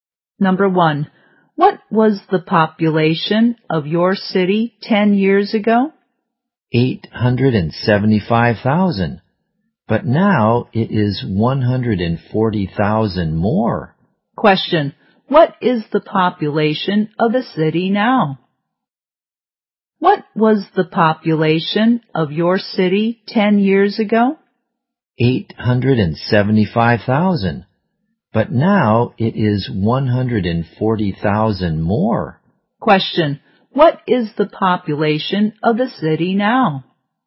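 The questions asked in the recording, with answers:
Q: Question, what is the population of the city now?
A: 1,015,000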